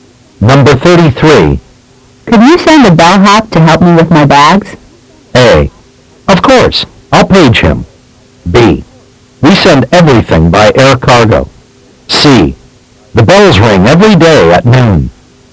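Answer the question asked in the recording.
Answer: A: Of course. I'll page him.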